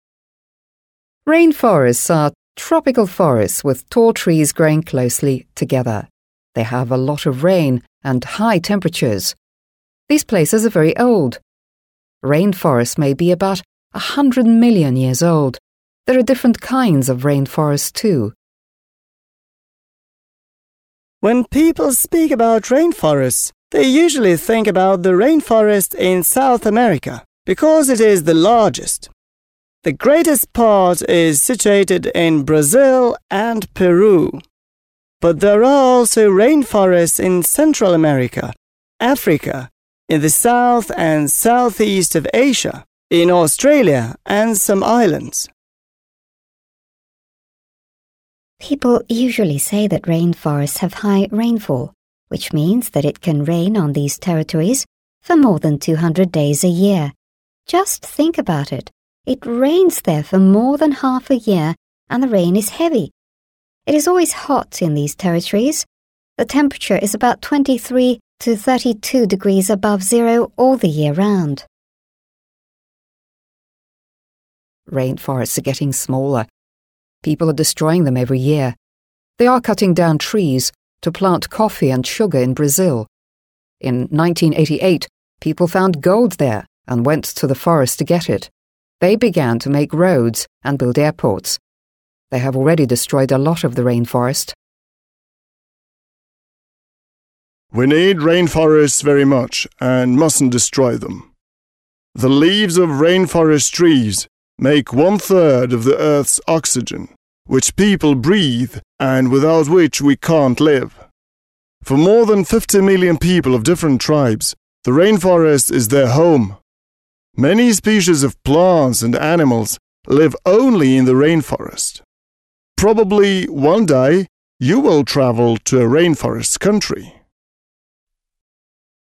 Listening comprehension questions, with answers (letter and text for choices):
You will hear 5 people speaking about rainforests1. Match the information the people give during their talks (1–5) with the statements below (a–f). There is one statement you don't have to use.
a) The speaker says that rainforests are in danger.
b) The speaker describes the places where we can find rainforests.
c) The speaker mentions the weather in rainforests.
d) The speaker says that rainforests are very important.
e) The speaker talks about the tribes that live in rainforests.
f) The speaker gives information about the age of rainforests.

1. Speaker 1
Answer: f) The speaker gives information about the age of rainforests.

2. Speaker 2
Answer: b) The speaker describes the places where we can find rainforests.

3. Speaker 3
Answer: c) The speaker mentions the weather in rainforests.

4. Speaker 4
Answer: a) The speaker says that rainforests are in danger.

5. Speaker 5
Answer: d) The speaker says that rainforests are very important.

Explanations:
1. The speaker gives information about the age of rainforests. — Говорящий дает информацию о возрасте тропических лесов (f). Текст: «These places are very old. Rainforests may be about 100 million years old.» (Эти места очень древние. Тропическим лесам может быть около 100 миллионов лет). Ключевые слова: old (старый), 100 million years (100 миллионов лет).
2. The speaker describes the places where we can find rainforests. — Говорящий описывает места, где мы можем найти тропические леса (b). Текст: «...rainforest in South America... Brazil and Peru. But there are also rainforests in Central America, Africa, in the south and southeast of Asia, in Australia...» (...леса в Южной Америке... Бразилии и Перу. Но также есть леса в Центральной Америке, Африке, на юге и юго-востоке Азии, в Австралии...). Ключевые слова: названия континентов и стран (South America, Africa, Asia, Australia).
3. The speaker mentions the weather in rainforests. — Говорящий упоминает погоду в тропических лесах (c). Текст: «...rainforests have high rainfall... It is always hot in these territories. The temperature is about 23 to 32 degrees...» (...в тропических лесах выпадает много осадков... На этих территориях всегда жарко. Температура от 23 до 32 градусов...). Ключевые слова: rainfall (осадки), rain (дождь), hot (жарко), temperature (температура), degrees (градусы).
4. The speaker says that rainforests are in danger. — Говорящий говорит, что тропические леса в опасности (a). Текст: «Rainforests are getting smaller. People are destroying them every year. They are cutting down trees... They have already destroyed a lot of the rainforest.» (Тропические леса становятся меньше. Люди уничтожают их каждый год. Они вырубают деревья... Они уже уничтожили много лесов). Ключевые слова: destroying (уничтожают), cutting down (вырубают), getting smaller (становятся меньше).
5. Хотя в последней части упоминается, что лес — это дом для племен (tribes), это лишь один из аргументов в пользу того, почему лес важен (пункт d). Отдельного рассказа, посвященного исключительно жизни и быту племен, в тексте не было.

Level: 7 класс